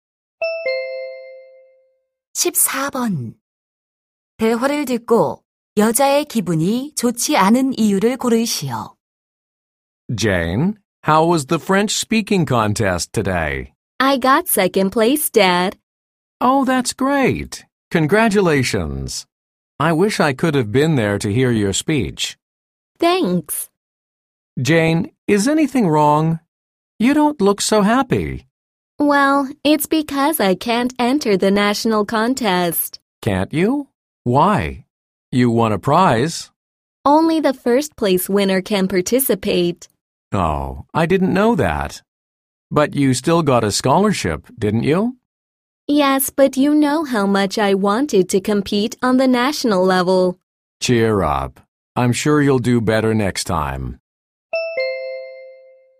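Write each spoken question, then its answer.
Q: 대화를 듣고 여자의 기분이 좋지 않은 이유를 고르시오.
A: 전국 대회에 참가할 수 없어서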